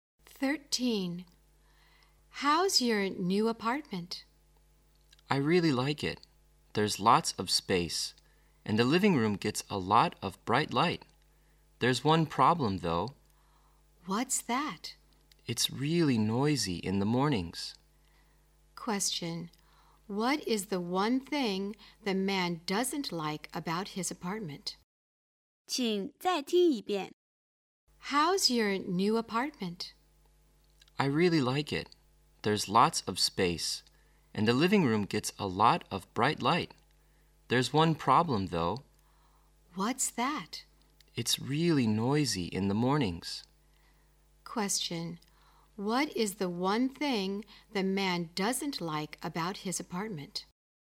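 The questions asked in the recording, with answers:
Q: what is the one thing the man doesn't like about his apartment?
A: It's really noisy in the mornings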